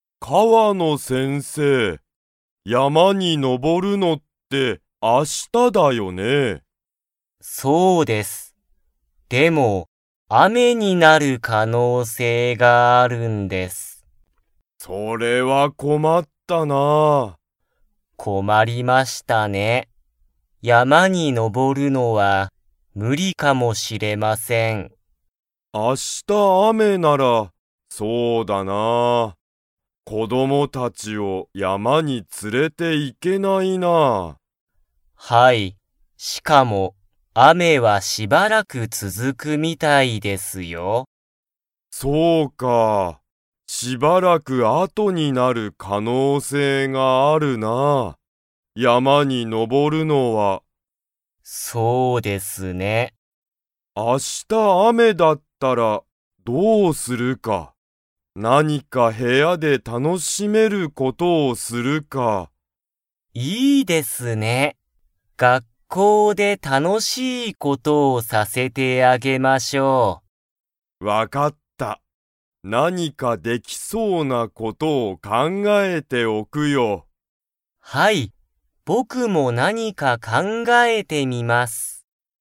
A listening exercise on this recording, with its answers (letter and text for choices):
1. 明日あした雨あめだったら、子こどもたちを山やまに連つれて 。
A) 行いける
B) 行いけない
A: B) 行いけない

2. 雨あめは、どのくらい続つづくみたいですか?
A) 一時間いちじかん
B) 12時間じかん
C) 明日あした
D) しばらく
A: D) しばらく

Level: Level 3